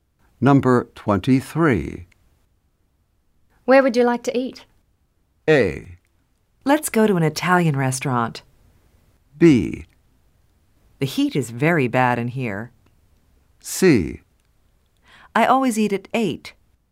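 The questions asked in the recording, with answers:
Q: Where would you like to eat?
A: A: Let's go to an Italian restaurant.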